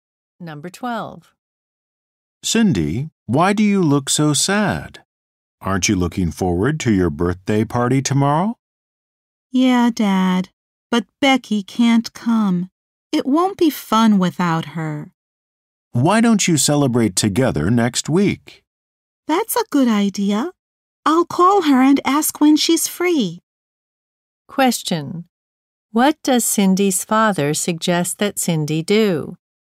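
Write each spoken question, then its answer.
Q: What does Cindy's father suggest that Cindy do?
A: Celebrate her birthday with Becky next week.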